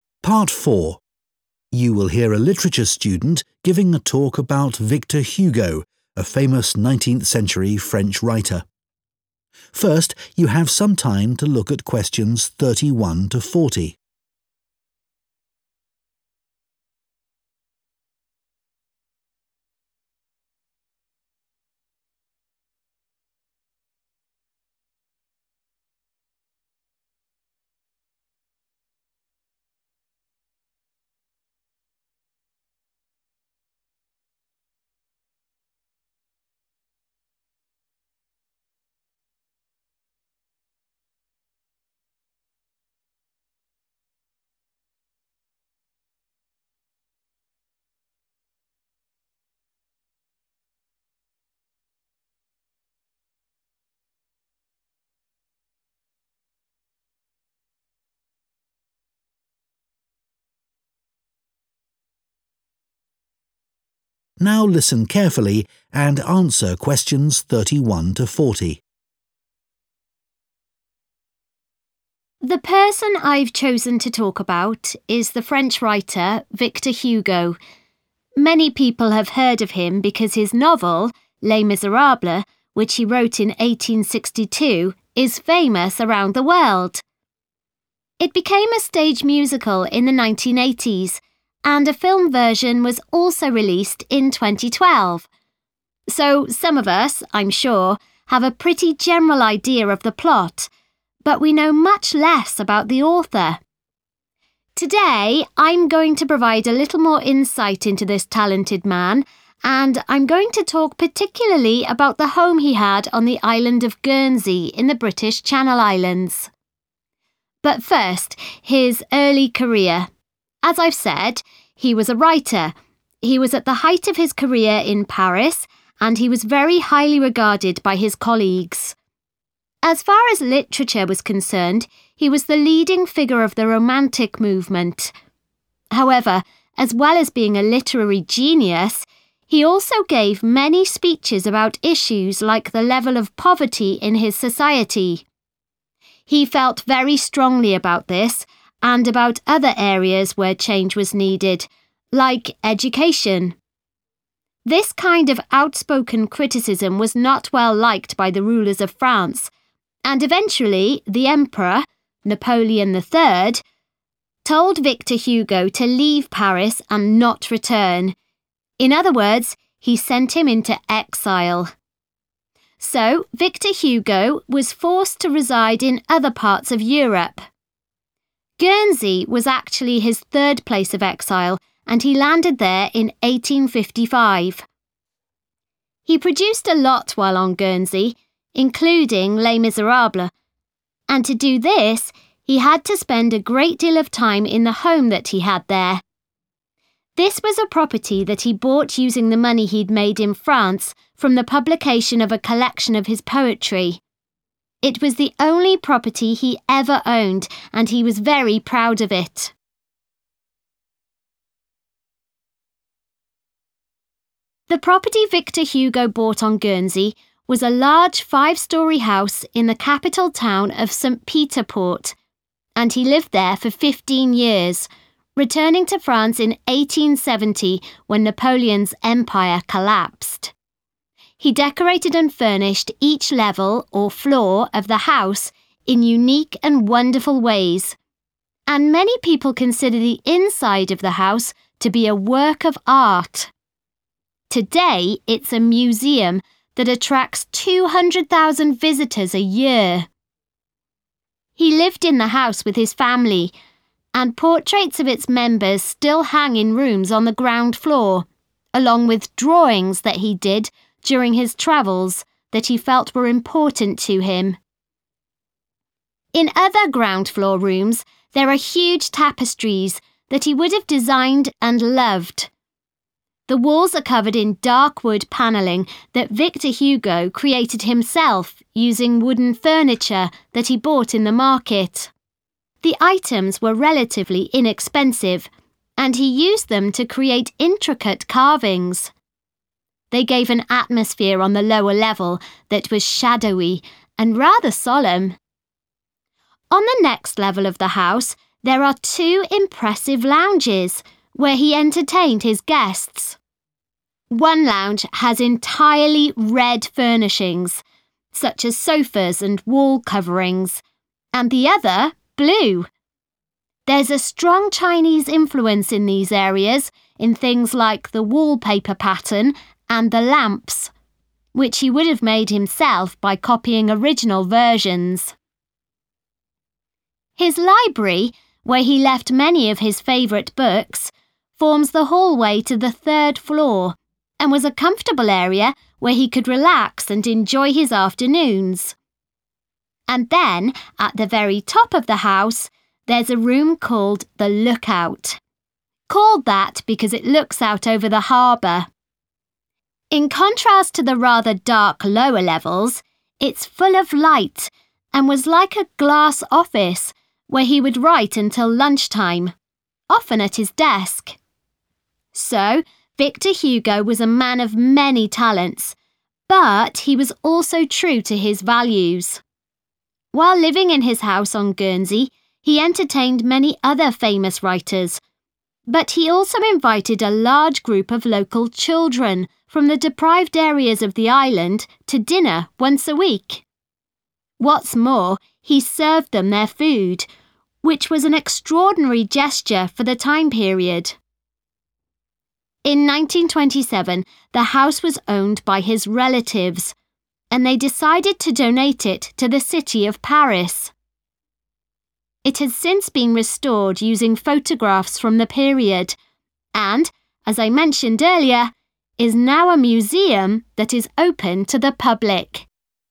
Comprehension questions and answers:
Questions 31-40 Complete the notes below. Write ONE WORD ONLY for each answer.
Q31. We know more about its overall 31 than about its author.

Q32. He spoke publicly about social issues, such as 32 and education.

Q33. Victor Hugo had to live elsewhere in 33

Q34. He used his income from the sale of some 34 he had written to buy a house on Guernsey.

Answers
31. plot
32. poverty
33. Europe
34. poetry

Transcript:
relatives
The person I've chosen to talk about is the French writer Victor Hugo – many people have heard of him because his novel, Les Miserables, which he wrote in 1862, is famous around the world. (Q31) It became a stage musical in the 1980s, and a film version was also released in 2012. Today, I'm going to provide a little more insight into this talented man and I'm going to talk particularly about the home he had on the island of Guernsey in the British Channel Islands. But first, his early career ... as I've said, he was a writer, he was at the height of his career in Paris and he was very highly regarded by his colleagues. As far as literature was concerned, he was the leading figure of the Romantic movement. (Q32) However, as well as being a literary genius, he also gave many speeches (=spoke publicly) about issues like the level of poverty in his society. (Q33) This kind of outspoken criticism was not well liked by the rulers of France and, eventually, the emperor – Napoleon III – told Victor Hugo to leave Paris and not return; in other words, he sent him into exile. (Q34) Guernsey was actually his third place of exile and he landed there in 1855. He produced a lot while on Guernsey -including Les Miserables -and to do this, he had to spend a great deal of time in the home that he had there. This was a property that he bought using the money he'd made (=his income) in France from the publication of a collection of his (=the sale of some) poetry (Guernsey thực chất là nơi lưu đày thứ ba của ông và ông đến đó vào năm 1855. It was the only property he ever owned, and he was very proud of it.
The property Victor Hugo bought on Guernsey was a large, five-storey house in the capital town of St Peter Port and he lived there for 15 years, returning to France in 1870 when Napoleon's Empire collapsed. He decorated and furnished each level, or floor, of the house in unique and wonderful ways, and many people consider the inside of the house to be a 'work of art'. Today it's a museum that attracts 200,000 visitors a year.
(Q35) He lived in the house with his family ... and portraits of its members still hang in rooms on the ground floor, along with (=contains) drawings that he did during his travels that he felt were important to him (Ông ấy sống chung với gia đình ... In other ground-floor rooms, there are huge tapestries that he would have designed and loved. The items were relatively inexpensive, and he used them to create intricate carvings. They gave an atmosphere on the lower level that was shadowy and rather solemn.
On the next level of the house there are two impressive lounges, where he entertained his guests. One lounge has entirely red furnishings, such as sofas and wall coverings, and the other blue.
His library, where he left many of his favorite books, forms the hallway to the third floor and was a comfortable area where he could relax and enjoy his afternoons. In contrast to the rather dark lower levels, it's full of light and was like a glass office where he would write until lunchtime – often at his desk.
So, Victor Hugo was a man of many talents, but he was also true to his values.